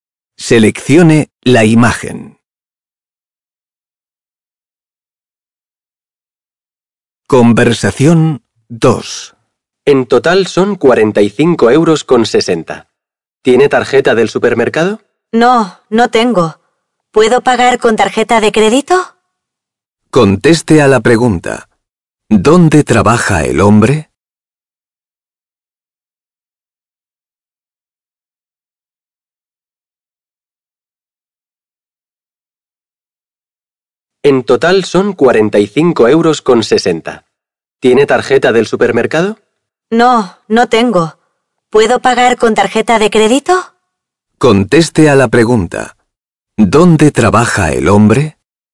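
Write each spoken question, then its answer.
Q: ¿Dónde trabaja el hombre?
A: En un supermercado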